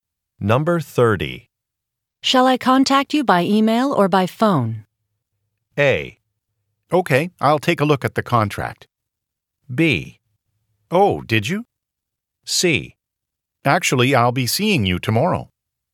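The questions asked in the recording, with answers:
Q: Shall I contact you by email or by phone?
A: C: Actually, I'll be seeing you tomorrow.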